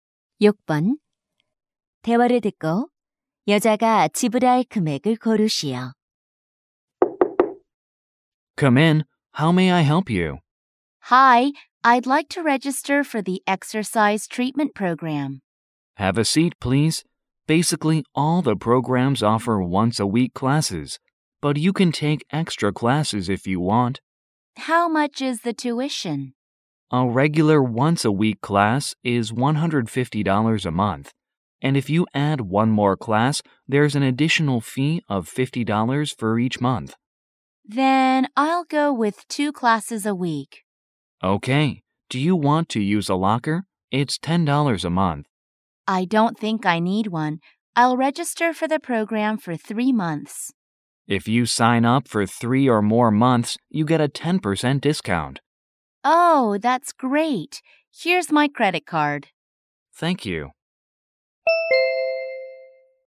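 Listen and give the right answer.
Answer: $540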